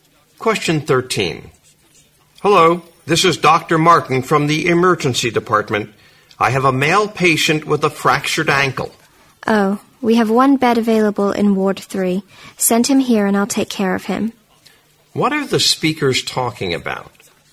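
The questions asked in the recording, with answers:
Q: What are the speakers talking about?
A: Finding a hospital bed for a patient with a fractured ankle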